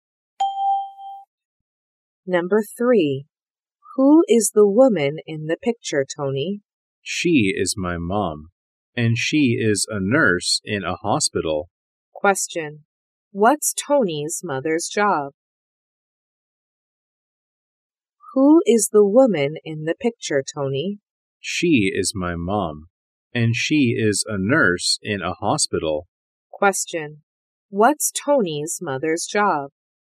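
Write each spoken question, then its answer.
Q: What's Tony's mother's job?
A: A nurse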